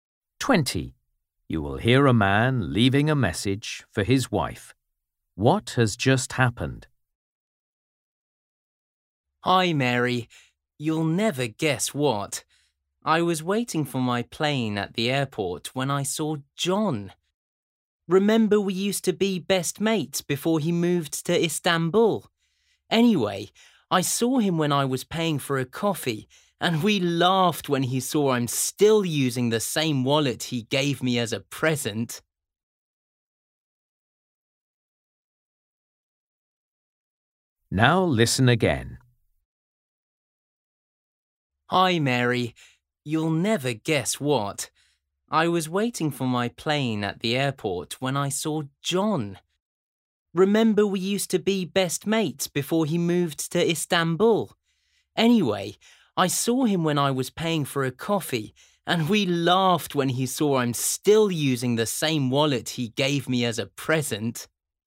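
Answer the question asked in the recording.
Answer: He met an old friend, John, at the airport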